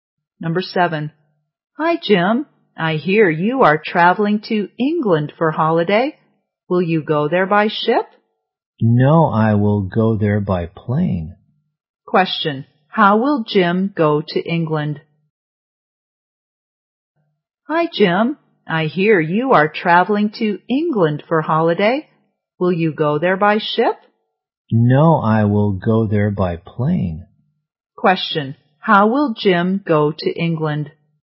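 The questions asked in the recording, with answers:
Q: Question. How will Jim go to England?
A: By plane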